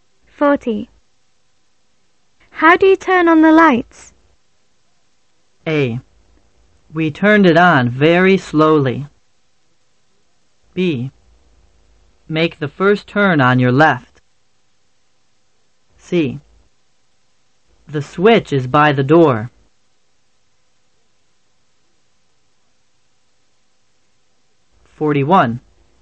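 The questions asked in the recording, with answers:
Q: How do you turn on the lights?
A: C: The switch is by the door.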